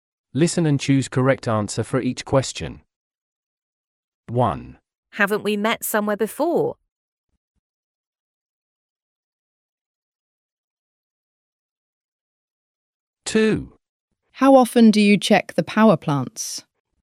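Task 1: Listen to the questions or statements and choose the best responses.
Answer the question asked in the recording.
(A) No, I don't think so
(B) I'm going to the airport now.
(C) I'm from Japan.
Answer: (A) No, I don't think so

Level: A2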